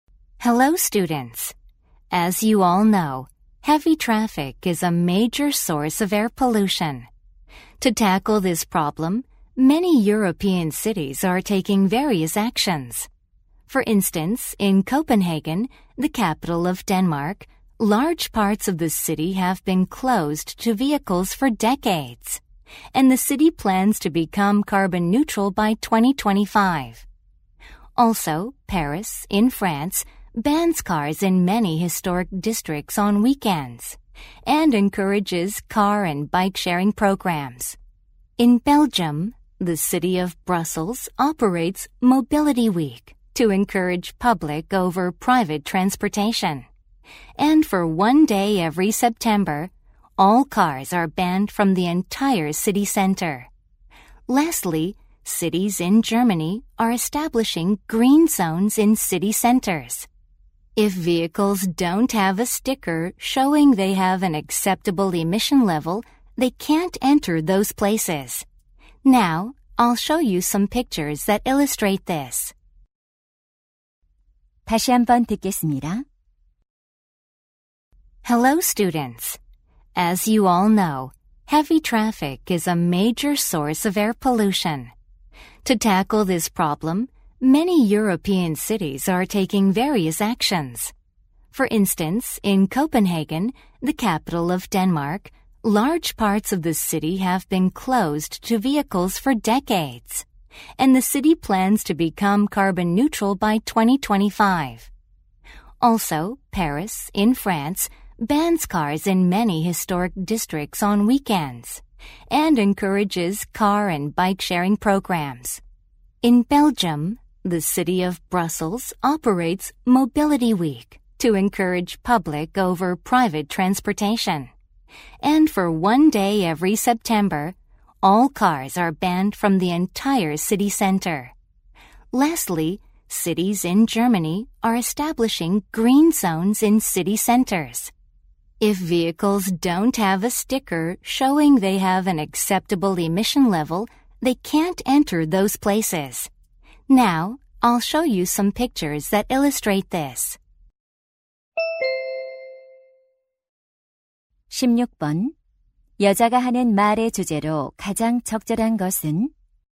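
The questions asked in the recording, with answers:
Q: 여자가 하는 말의 주제로 가장 적절한 것은?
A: 교통으로 인한 대기오염을 줄이기 위한 유럽 도시들의 노력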